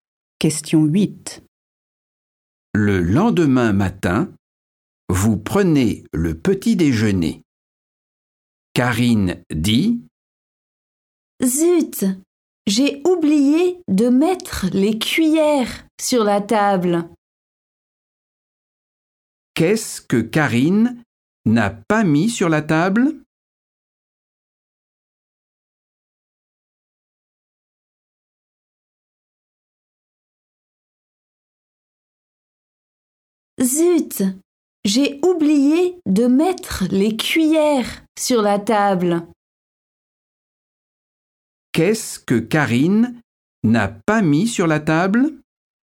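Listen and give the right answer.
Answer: les cuillères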